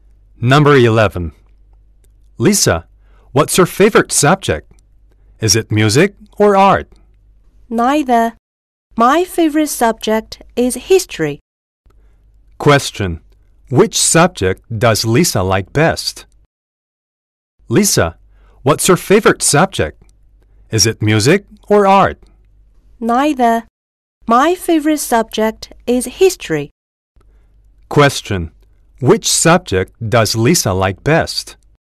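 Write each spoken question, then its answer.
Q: Which subject does Lisa like best?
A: History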